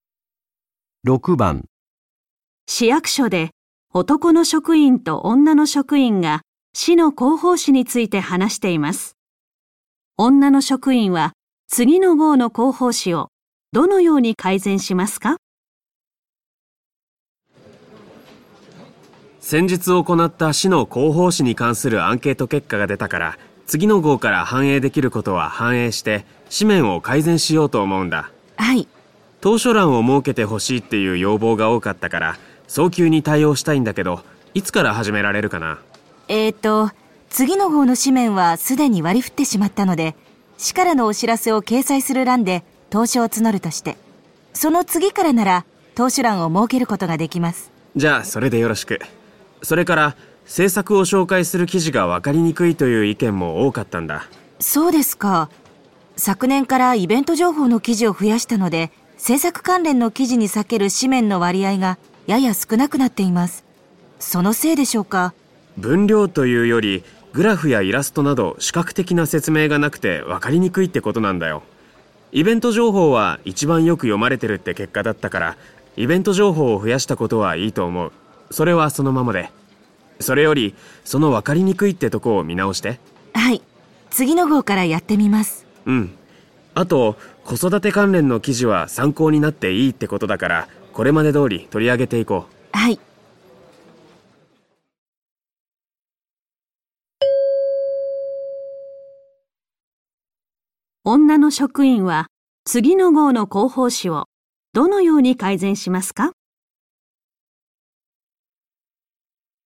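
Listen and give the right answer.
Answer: 政策を紹介する記事にグラフやイラストなど視覚的な説明を加える

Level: N1级别听力题库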